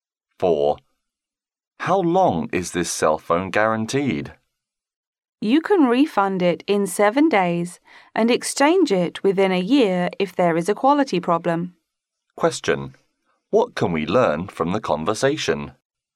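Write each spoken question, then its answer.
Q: What can we learn from the conversation?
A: The phone can be refunded within 7 days and exchanged within a year if there is a quality problem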